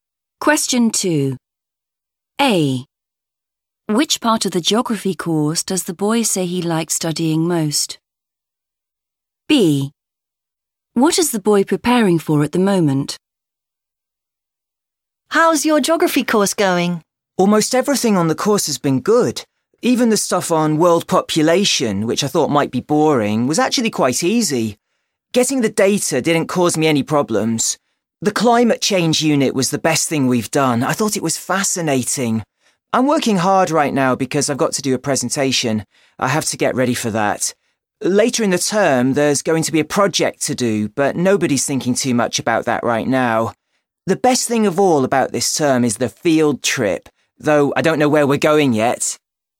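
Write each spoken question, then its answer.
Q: Which part of the geography course does the boy say he likes studying most?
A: climate change

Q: What is the boy preparing for at the moment?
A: a presentation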